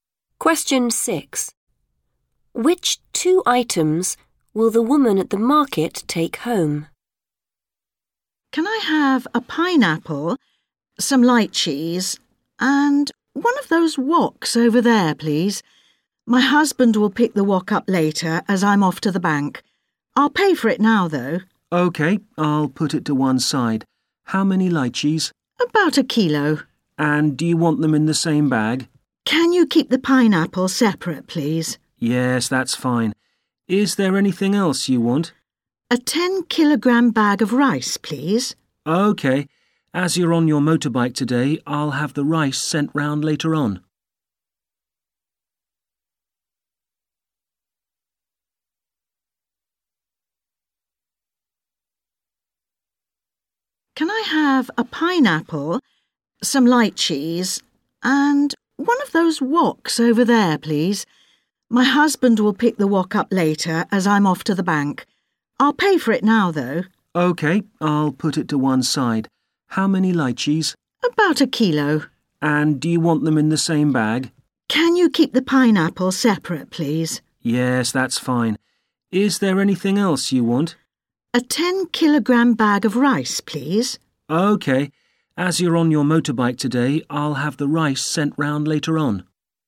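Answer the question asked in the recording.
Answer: The pineapple and the lychees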